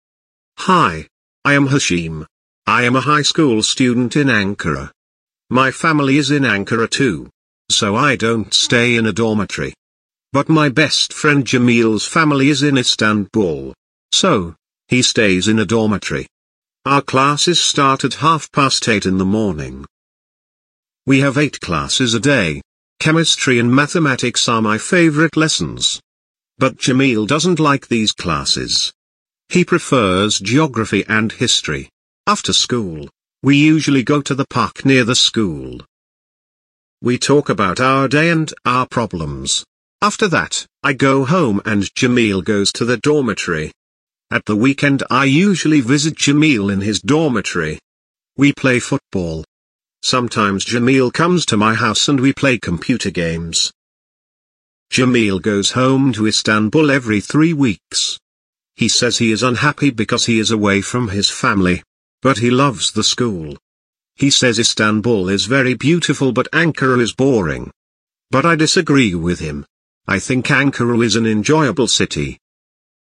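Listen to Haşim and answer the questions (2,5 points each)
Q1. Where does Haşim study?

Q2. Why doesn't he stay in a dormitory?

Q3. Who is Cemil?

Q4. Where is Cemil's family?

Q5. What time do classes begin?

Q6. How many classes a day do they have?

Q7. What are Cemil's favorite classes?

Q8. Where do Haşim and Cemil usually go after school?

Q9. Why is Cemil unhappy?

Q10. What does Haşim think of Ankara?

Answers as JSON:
{"1": "At a high school in Ankara", "2": "Because his family is in Ankara too", "3": "His best friend", "4": "In Istanbul", "5": "At 8:30 in the morning", "6": "Eight", "7": "Geography and history", "8": "To the park near the school", "9": "Because he is away from his family", "10": "He thinks it is an enjoyable city"}

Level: 10. sınıf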